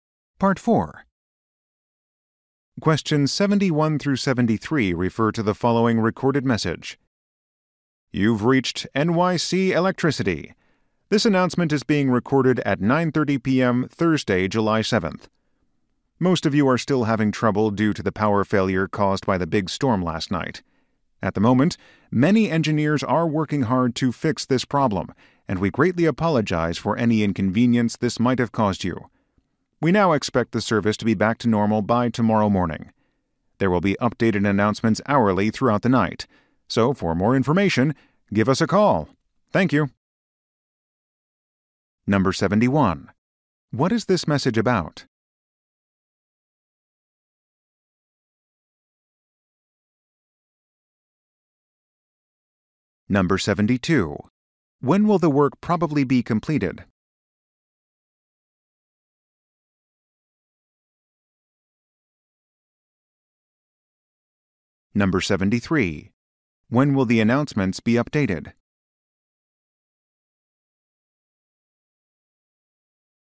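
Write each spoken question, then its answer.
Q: What is this message about?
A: A power failure caused by a storm

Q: When will the work probably be completed?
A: Tomorrow morning

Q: When will the announcements be updated?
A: Hourly throughout the night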